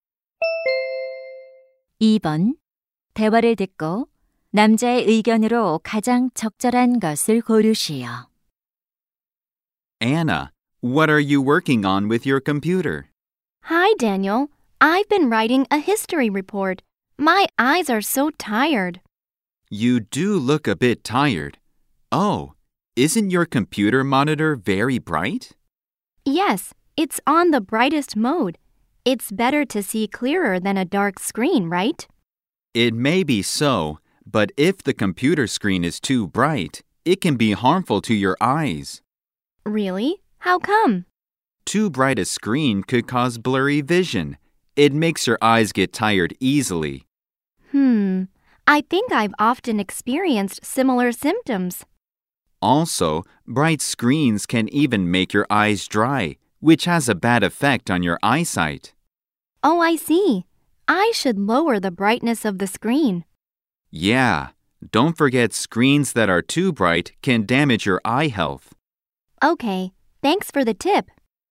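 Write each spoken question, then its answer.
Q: 대화를 듣고 남자의 의견으로 가장 적절한 것을 고르시오.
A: 지나치게 밝은 컴퓨터 화면은 눈 건강을 해칠 수 있다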